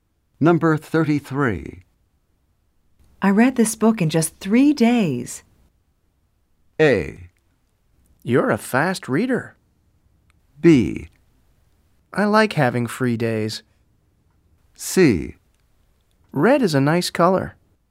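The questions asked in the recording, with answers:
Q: I read this book in just 3 days.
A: A: You're a fast reader.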